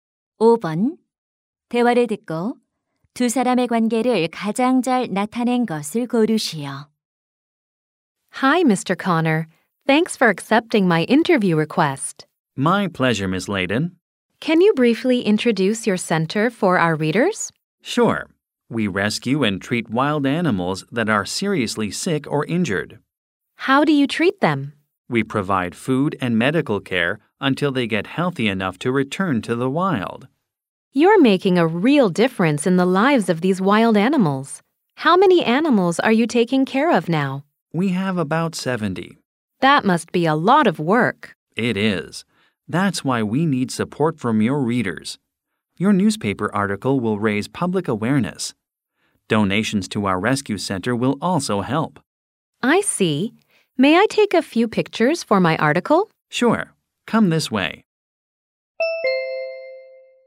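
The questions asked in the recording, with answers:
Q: 대화를 듣고 두 사람의 관계를 가장 잘 나타낸 것을 고르시오.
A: 신문 기자 — 야생동물 구조센터 운영자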